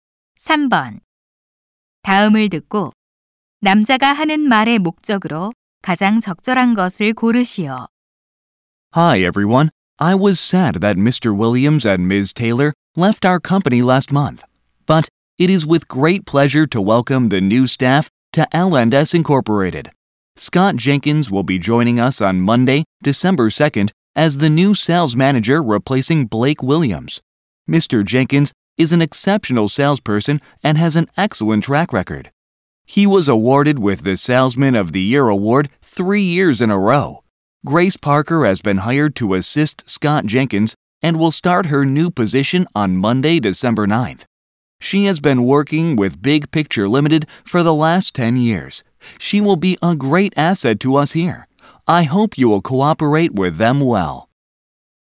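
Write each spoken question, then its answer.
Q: 다음을 듣고 남자가 하는 말의 목적으로 가장 적절한 것을 고르시오.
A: 새로 온 직원들을 소개하려고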